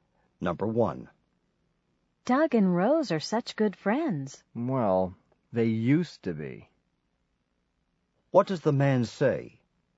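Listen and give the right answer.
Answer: Doug and Rose are no longer good friends.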